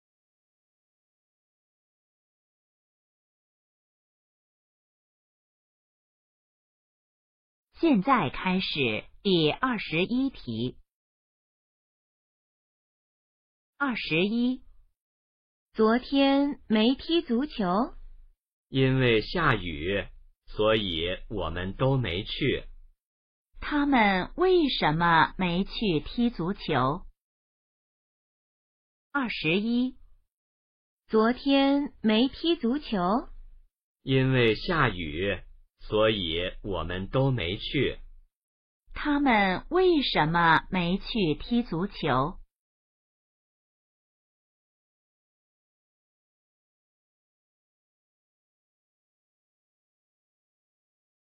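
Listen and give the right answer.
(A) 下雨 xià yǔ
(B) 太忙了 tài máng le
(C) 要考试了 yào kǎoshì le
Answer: (A) 下雨 xià yǔ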